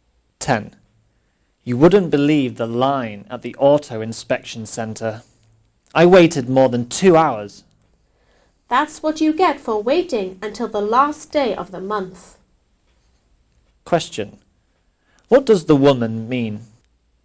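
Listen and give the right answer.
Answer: The man shouldn't have waited until the last day of the month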